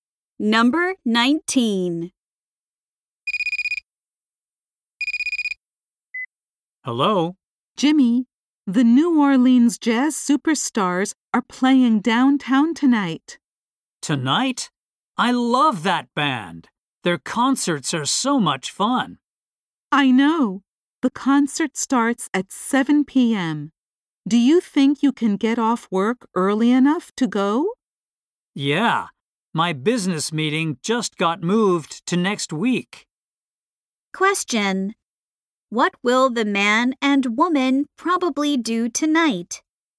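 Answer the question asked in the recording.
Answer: Go to a jazz concert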